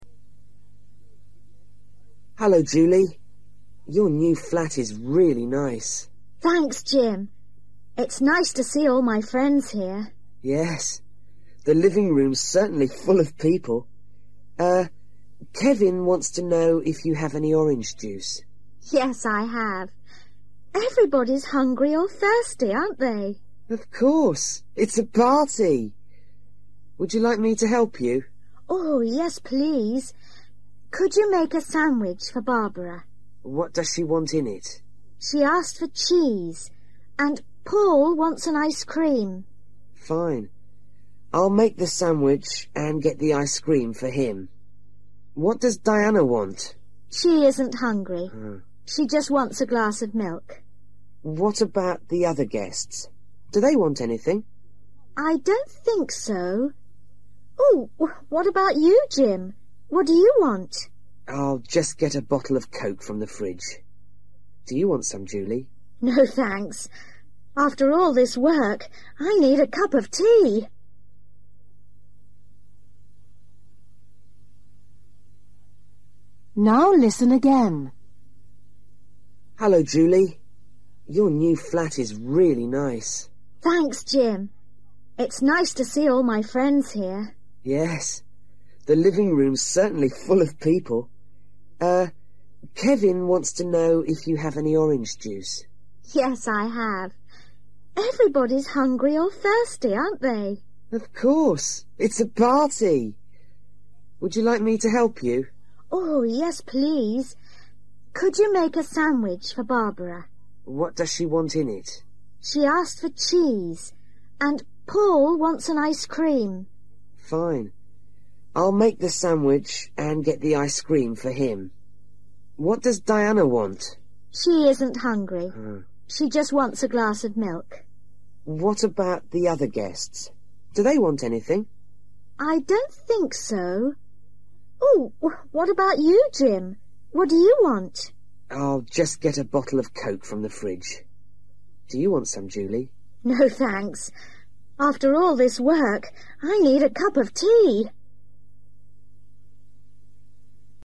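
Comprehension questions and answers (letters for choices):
For each question, choose the correct answer.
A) coffee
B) coke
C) ice-cream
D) milk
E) orange juice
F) sandwich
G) tea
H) water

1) Barbara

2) Paul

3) Diana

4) Jim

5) Julie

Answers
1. F
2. C
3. D
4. B
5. G

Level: Luyện nghe trình độ A2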